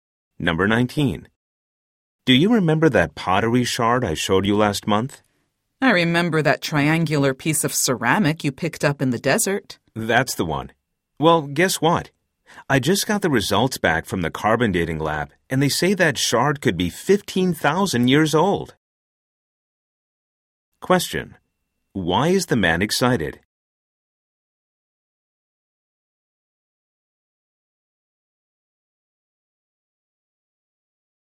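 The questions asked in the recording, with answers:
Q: Why is the man excited?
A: The shard could be 15,000 years old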